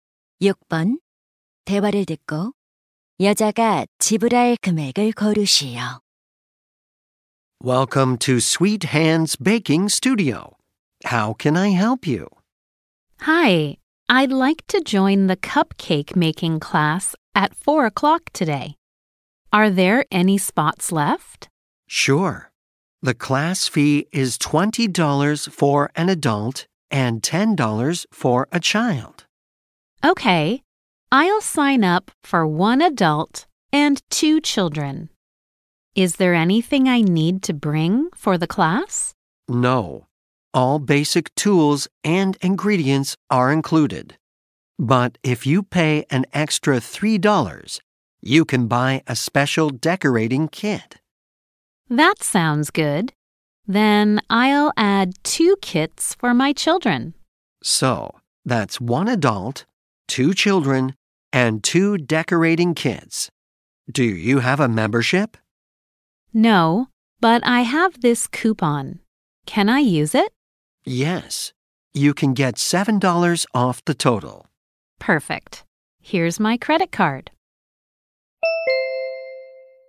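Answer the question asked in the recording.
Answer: $39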